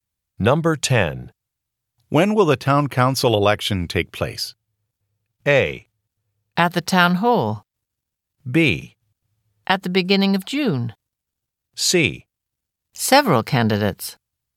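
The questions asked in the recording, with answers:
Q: When will the town council election take place?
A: B: At the beginning of June.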